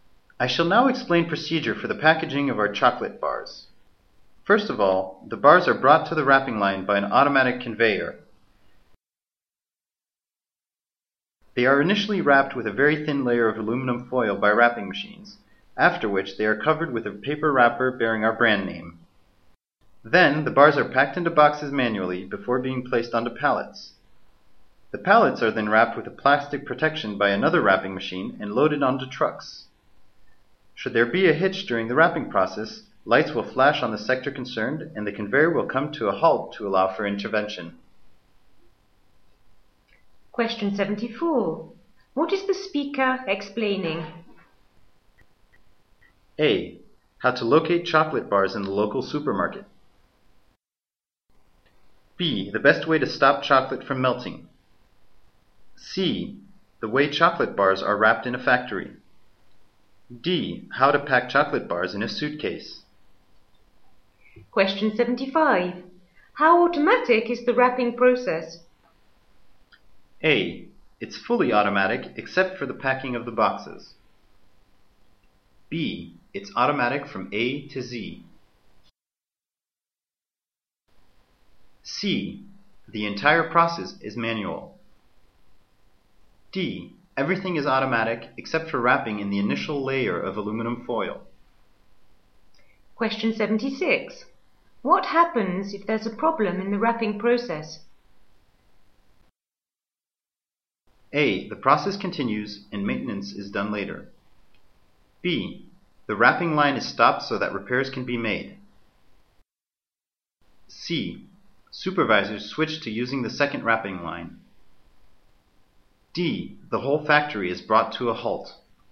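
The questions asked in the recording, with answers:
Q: What is the speaker explaining?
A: C: The way chocolate bars are wrapped in a factory.

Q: How automatic is the wrapping process?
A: A: It's fully automatic except for the packing of the boxes.

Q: What happens if there's a problem in the wrapping process?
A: B: The wrapping line is stopped so that repairs can be made.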